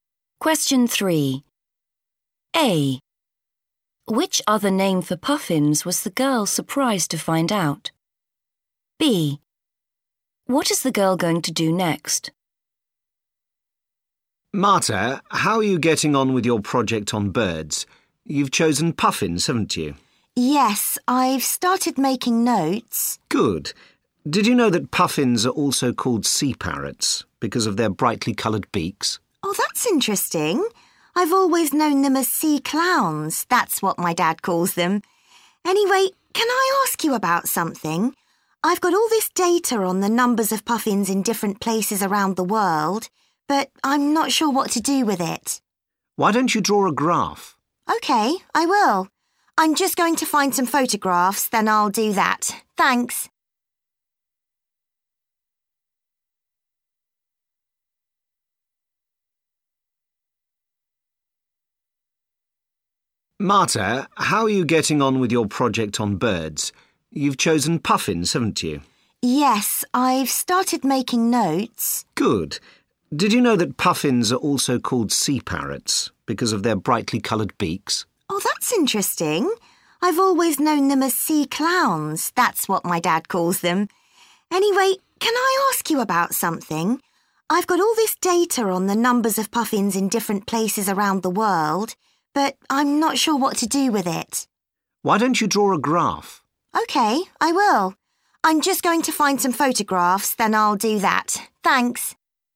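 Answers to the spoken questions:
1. sea parrots
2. find some photographs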